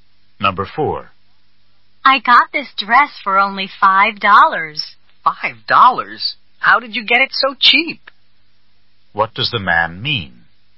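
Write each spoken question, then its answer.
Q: What does the man mean?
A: He is surprised the dress was so cheap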